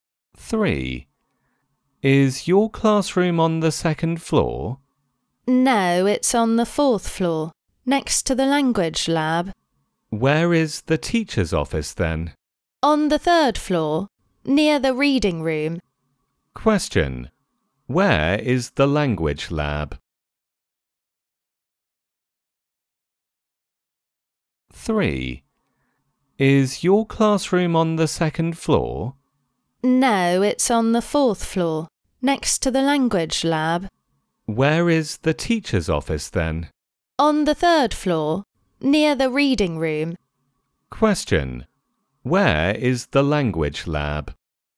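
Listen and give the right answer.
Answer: On the fourth floor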